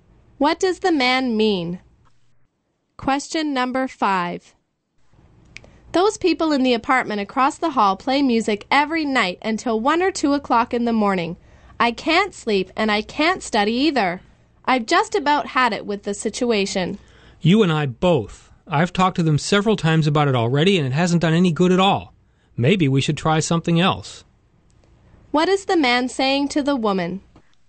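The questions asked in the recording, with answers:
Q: What is the man saying to the woman?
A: Talking to the neighbors hasn't worked, so they should try something else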